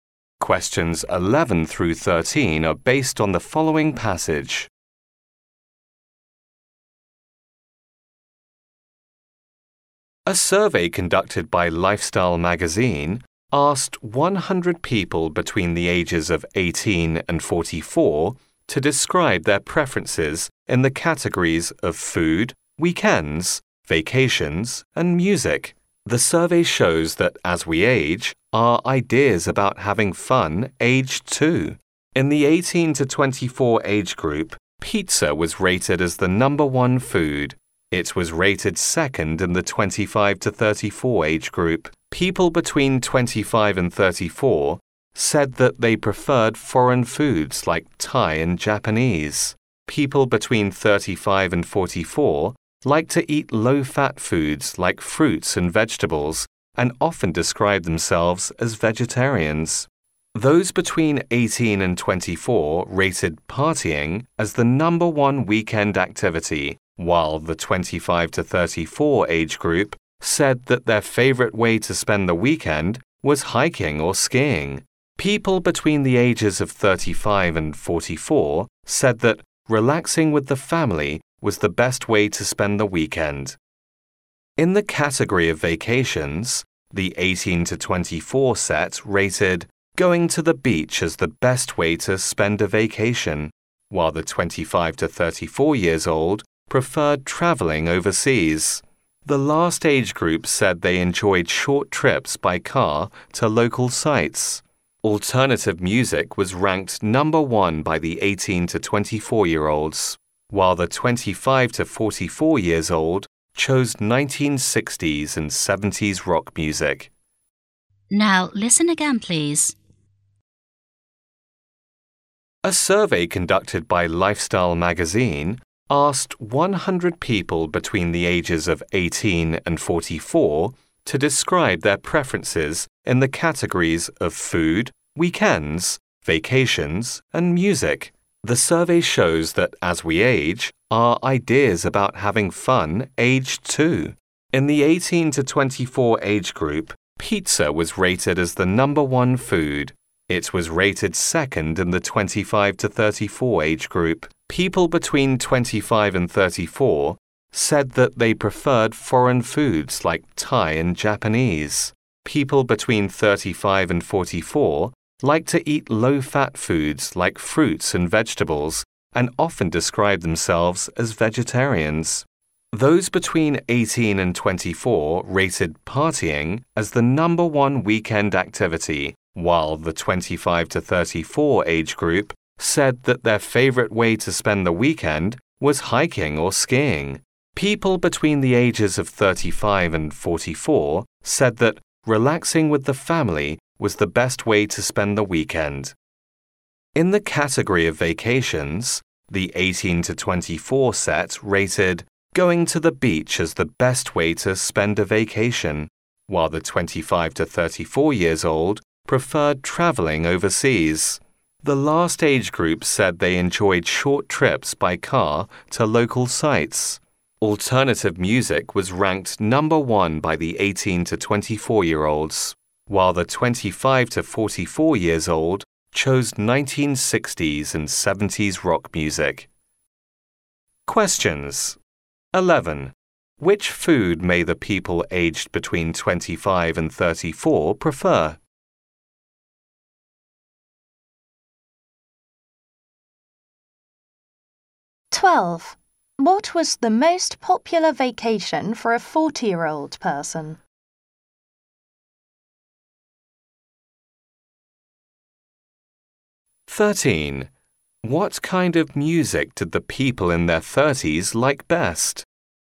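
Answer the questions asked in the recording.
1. Foreign foods like Thai and Japanese
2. Short trips by car to local sites
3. 1960s and 70s rock music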